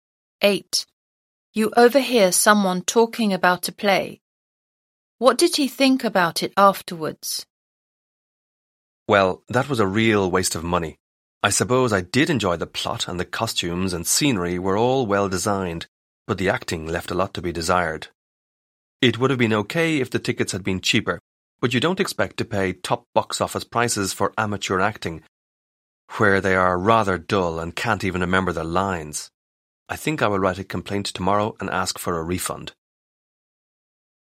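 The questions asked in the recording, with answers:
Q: What did he think about it afterwards?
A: It was a waste of money because the acting was poor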